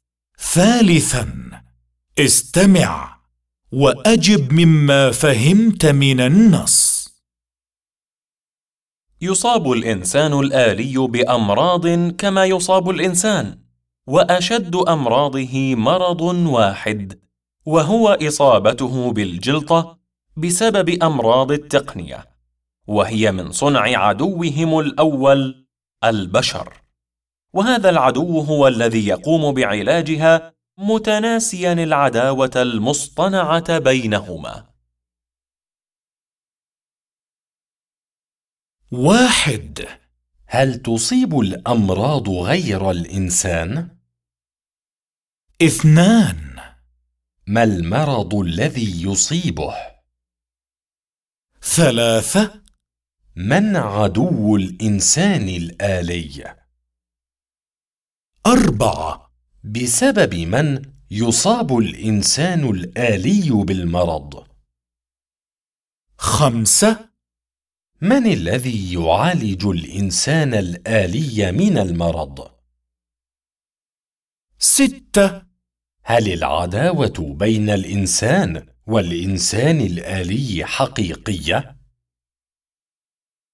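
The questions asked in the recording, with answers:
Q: هل تصيب الأمراض غير الإنسان؟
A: نعم، تصيب الإنسان الآلي

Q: ما المرض الذي يصيبه؟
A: الجلطة بسبب أمراض التقنية

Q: من عدو الإنسان الآلي؟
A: البشر

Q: بسبب من يصاب الإنسان الآلي بالمرض؟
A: بسبب البشر (أمراض التقنية من صنعهم)

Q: من الذي يعالج الإنسان الآلي من المرض؟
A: البشر

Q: هل العداوة بين الإنسان والإنسان الآلي حقيقية؟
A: لا، هي عداوة مصطنعة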